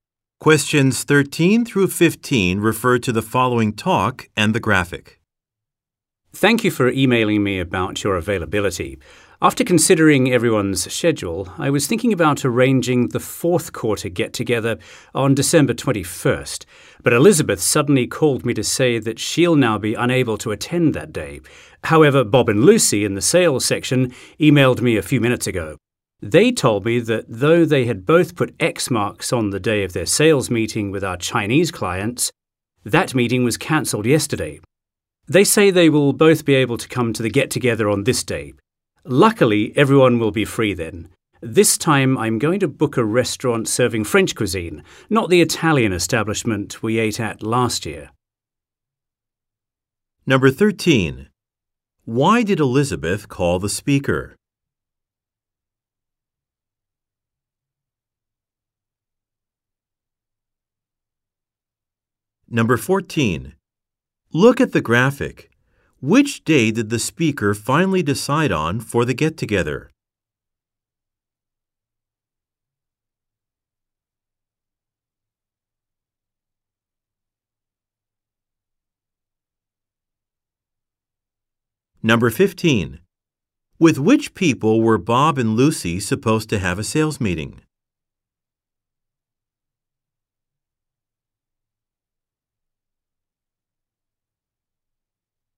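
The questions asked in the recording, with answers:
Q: Why did Elizabeth call the speaker?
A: To say she can't attend on December 21st

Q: With which people were Bob and Lucy supposed to have a sales meeting?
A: Chinese clients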